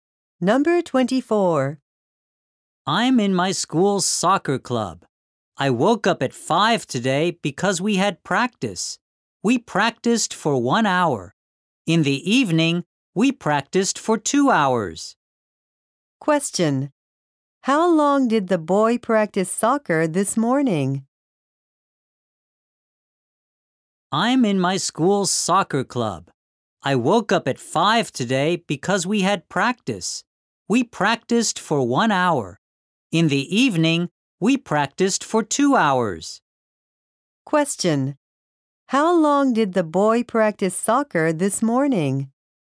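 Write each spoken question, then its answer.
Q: How long did the boy practice soccer this morning?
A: 1 hour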